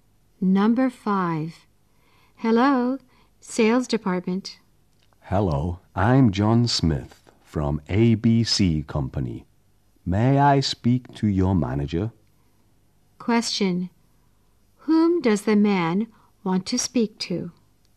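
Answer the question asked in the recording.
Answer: The manager.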